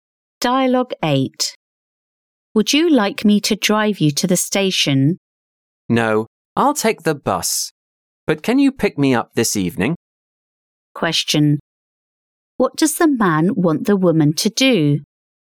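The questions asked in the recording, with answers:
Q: What does the man want the woman to do?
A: Pick him up this evening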